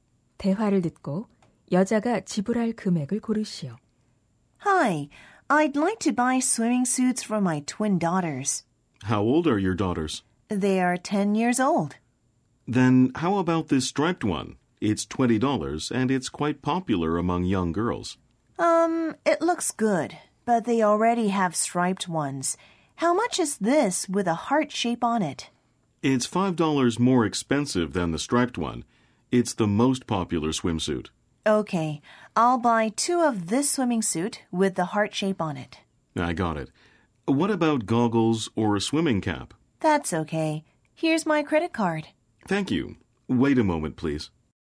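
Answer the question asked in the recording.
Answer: $50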